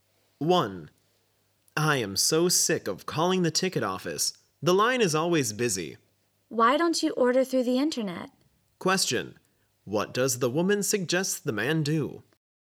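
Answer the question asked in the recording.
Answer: Order tickets through the internet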